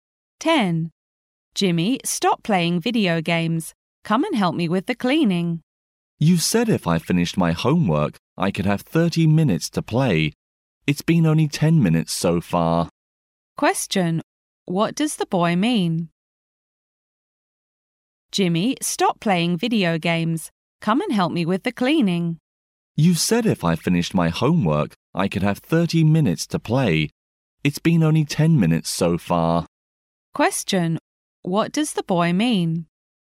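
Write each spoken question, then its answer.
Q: What does the boy mean?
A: He still has 20 minutes left to play video games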